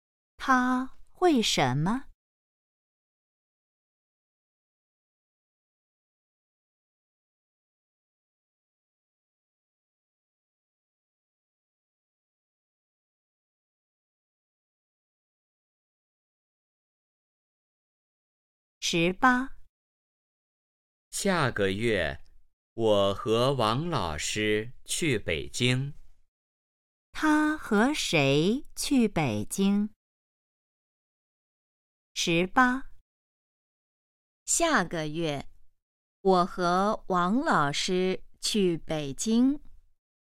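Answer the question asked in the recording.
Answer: 王老师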